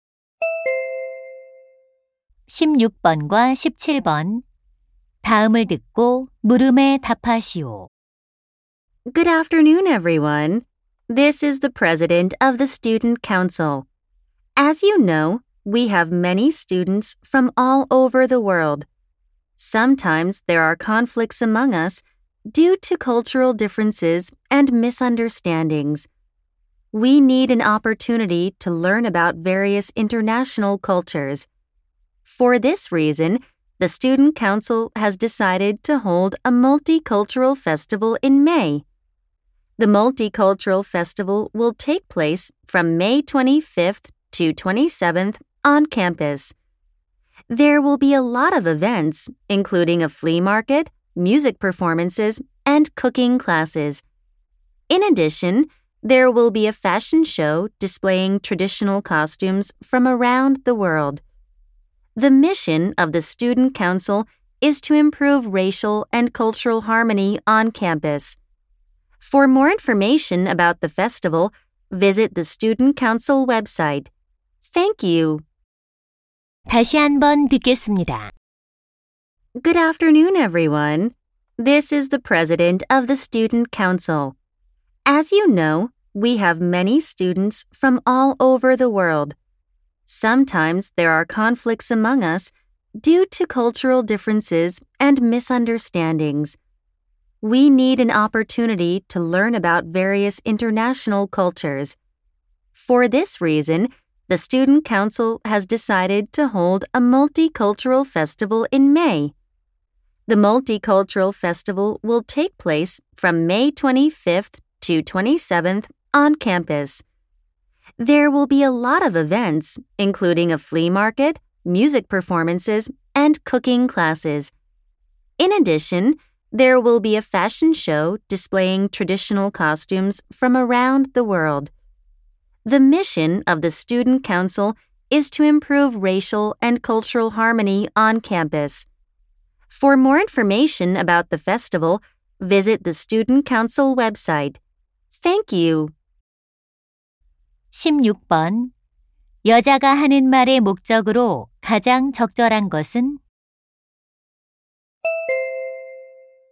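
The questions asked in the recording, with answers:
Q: 여자가 하는 말의 목적으로 가장 적절한 것은?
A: 다문화 축제 개최를 알리려고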